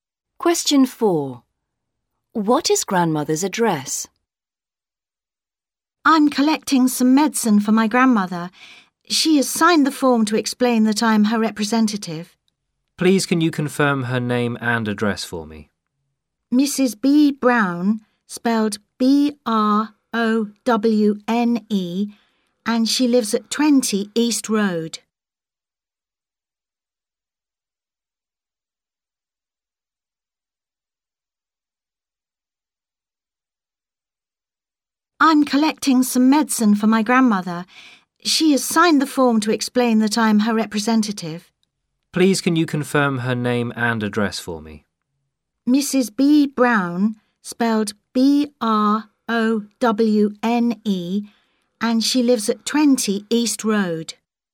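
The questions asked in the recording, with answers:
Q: What is grandmother's address?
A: 20 East Road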